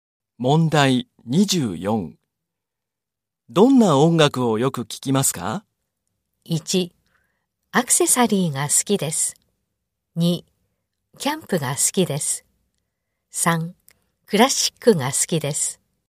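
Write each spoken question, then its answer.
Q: どんな音楽をよく聞きますか?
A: 3: クラシックが好きです。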